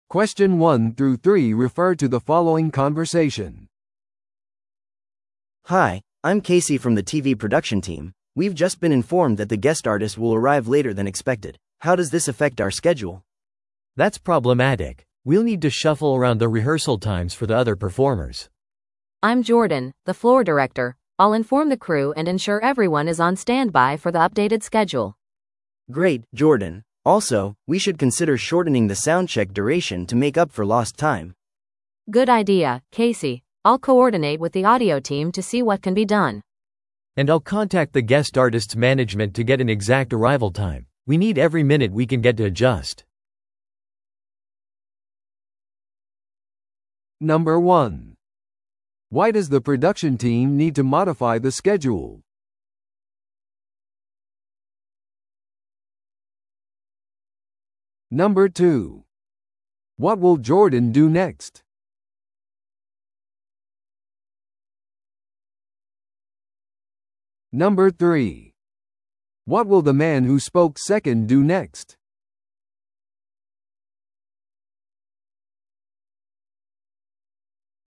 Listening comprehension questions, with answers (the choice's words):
Listen to the audio below and answer the questions.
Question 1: Why does the production team need to modify the schedule?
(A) スピーカーの一人が休憩を提案した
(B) 元のスケジュールに誤りがあった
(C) ゲストアーティストの到着が遅れる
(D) クルーがより多くのリハーサル時間を要求した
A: ゲストアーティストの到着が遅れる

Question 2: What will Jordan do next?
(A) リハーサルの時間を調整する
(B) サウンドチェックの期間を短縮する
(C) クルーに更新されたスケジュールについて情報を伝える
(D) ゲストアーティストのマネージメントに連絡する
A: クルーに更新されたスケジュールについて情報を伝える

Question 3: What will the man who spoke second do next?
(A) 他の出演者のリハーサル時間を調整する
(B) サウンドチェックについてオーディオチームと調整する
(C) 更新されたスケジュールのために皆が待機状態でいることを確認する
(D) ゲストアーティストのマネージメントから正確な到着時間を取得する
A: ゲストアーティストのマネージメントから正確な到着時間を取得する

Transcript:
A: Hi, I'm Casey from the TV production team. We've just been informed that the guest artist will arrive later than expected. How does this affect our schedule?
B: That's problematic. We'll need to shuffle around the rehearsal times for the other performers.
C: I'm Jordan, the floor director. I'll inform the crew and ensure everyone is on standby for the updated schedule.
A: Great, Jordan. Also, we should consider shortening the soundcheck duration to make up for lost time.
C: Good idea, Casey. I'll coordinate with the audio team to see what can be done.
B: And I'll contact the guest artist's management to get an exact arrival time. We need every minute we can get to adjust.